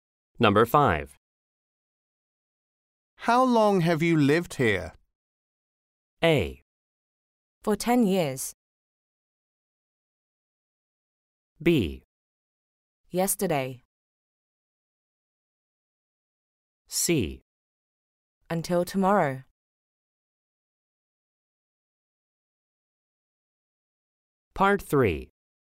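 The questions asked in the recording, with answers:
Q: How long have you lived here?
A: A: For 10 years.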